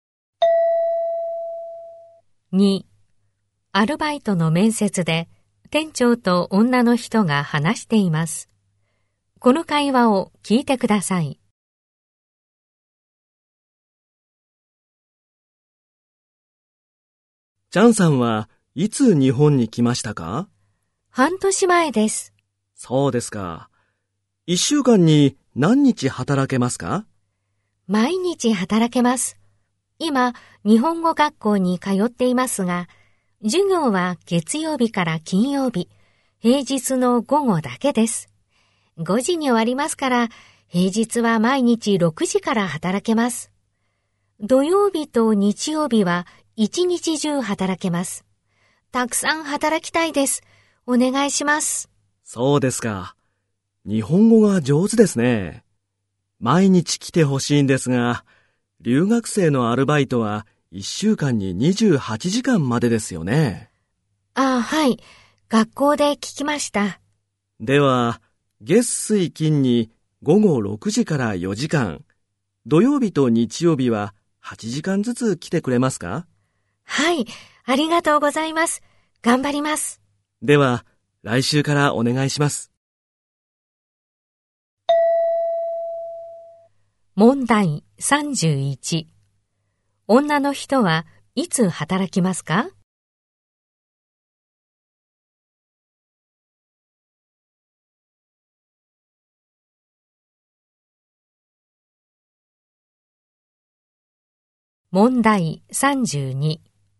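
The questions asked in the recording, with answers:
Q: 女の人はいつ働きますか?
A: 月水金の午後6時から4時間と土日に8時間ずつ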